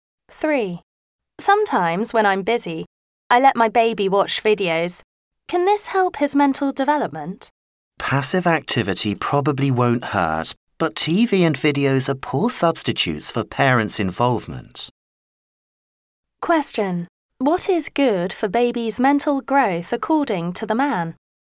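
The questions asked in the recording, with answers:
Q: What is good for baby's mental growth according to the man?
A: Parents' involvement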